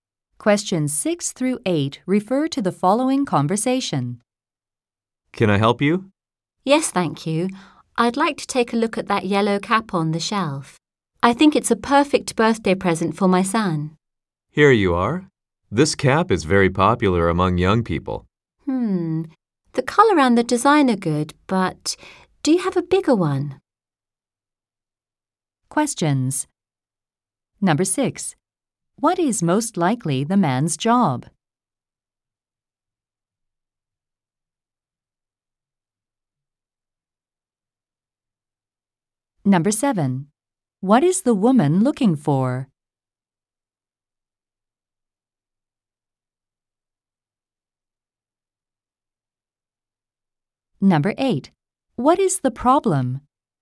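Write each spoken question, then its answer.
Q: What is most likely the man's job?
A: A store clerk (salesperson)

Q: What is the woman looking for?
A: A cap (a birthday present for her son)

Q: What is the problem?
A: The cap is too small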